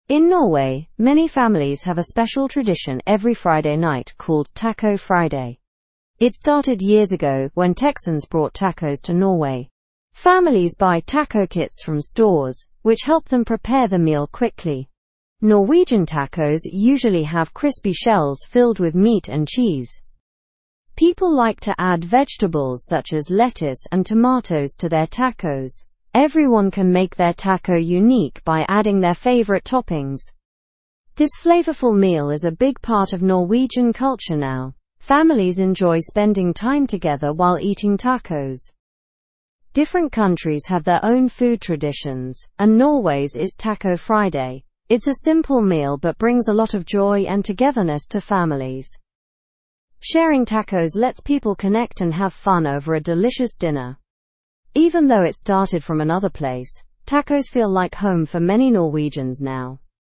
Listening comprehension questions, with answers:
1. What night is Taco Friday celebrated in Norway?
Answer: Friday night.

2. Who brought tacos to Norway?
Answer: Texan oil workers brought tacos to Norway.

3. Where do families buy items to make tacos?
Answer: Families buy taco kits from the store.

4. What type of shell is commonly used in Norwegian tacos?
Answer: A hard shell is commonly used.

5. What vegetables are popular in Norwegian tacos?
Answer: Lettuce and tomatoes are popular in Norwegian tacos.

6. How does Taco Friday affect Norwegian families?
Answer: It allows families to bond and enjoy time together.

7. What makes tacos feel special in Norway?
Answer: The chance to customize them and their connection to family traditions makes them special.

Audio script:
In Norway, many families have a special tradition every Friday night called Taco Friday. It started years ago when Texans brought tacos to Norway. Families buy taco kits from stores which help them prepare the meal quickly. Norwegian tacos usually have crispy shells filled with meat and cheese.
People like to add vegetables such as lettuce and tomatoes to their tacos. Everyone can make their taco unique by adding their favorite toppings. This flavorful meal is a big part of Norwegian culture now. Families enjoy spending time together while eating tacos.
Different countries have their own food traditions, and Norway's is Taco Friday. It's a simple meal but brings a lot of joy and togetherness to families. Sharing tacos lets people connect and have fun over a delicious dinner. Even though it started from another place, tacos feel like home for many Norwegians now.

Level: (Level 2)